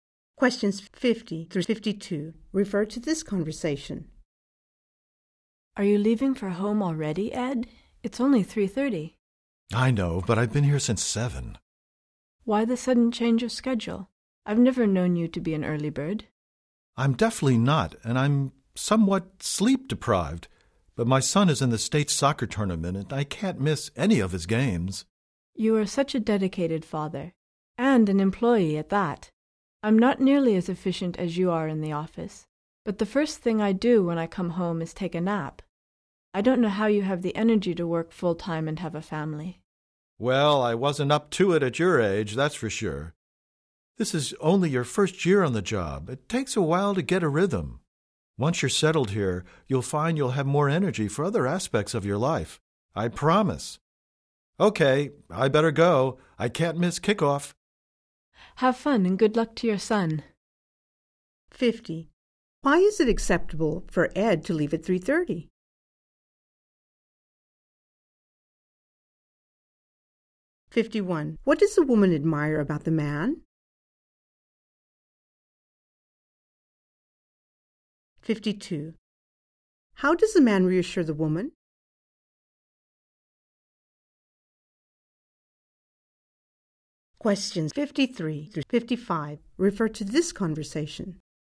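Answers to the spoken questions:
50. He has been at work since 7
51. His energy to work full-time and be a dedicated father
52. She'll have more energy once she's settled in the job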